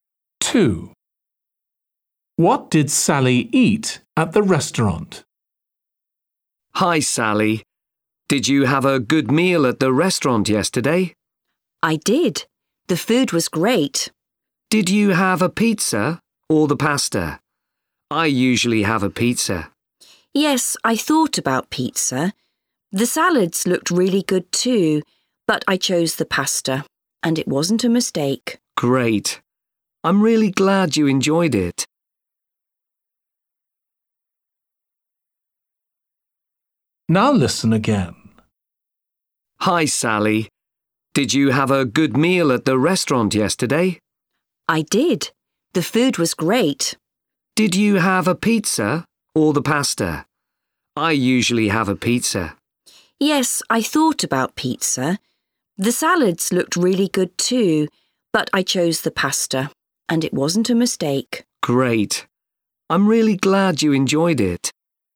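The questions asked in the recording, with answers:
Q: What did Sally eat at the restaurant?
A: pasta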